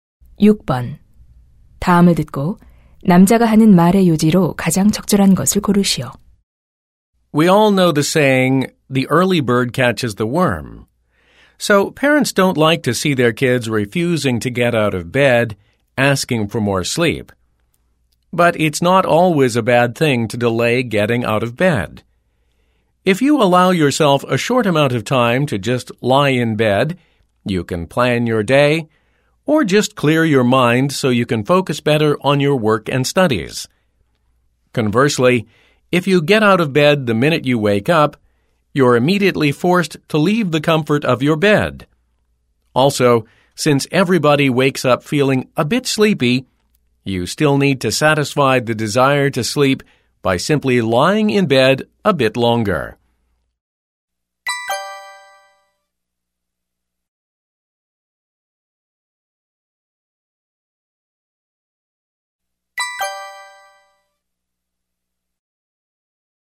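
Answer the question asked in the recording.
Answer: 잠에서 깬 후 잠시 침대에 누워 있는 것이 도움이 된다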